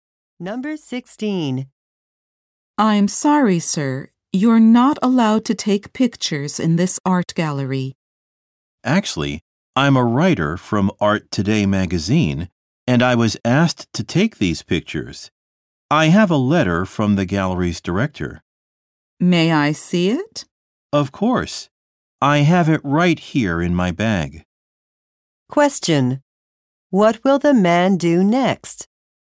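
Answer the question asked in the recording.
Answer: Show the letter from the gallery's director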